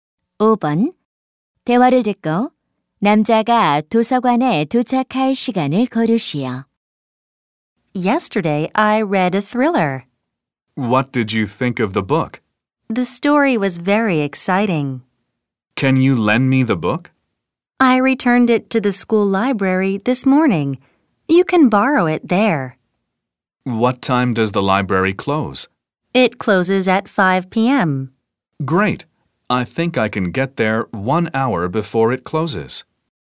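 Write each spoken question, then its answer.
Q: 대화를 듣고 남자가 도서관에 도착할 시간을 고르시오.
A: 오후 4시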